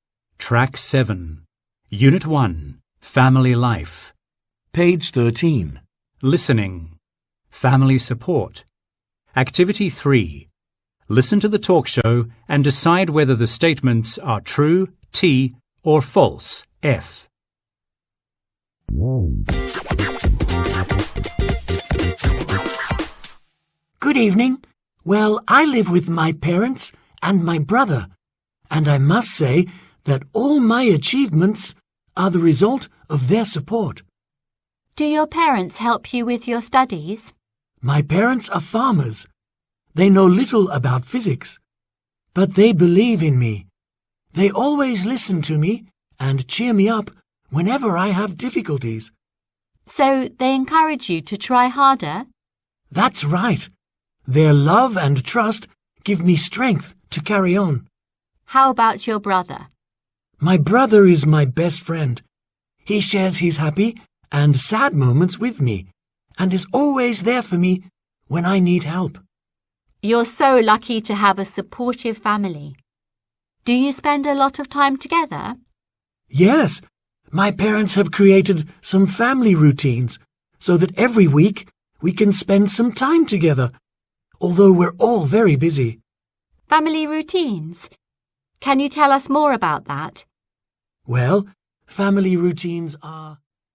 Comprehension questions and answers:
Task: Decide if each sentence is True (T) or False (F)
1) Huu's parents are teachers.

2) His parents always believe in him.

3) His brother often helps him when needed.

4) The family never spends time together.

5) Family routines help them spend time together weekly.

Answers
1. False
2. True
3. True
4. False
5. True

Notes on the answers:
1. His parents are farmers, not teachers.
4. The family does spend time together.

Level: lớp 10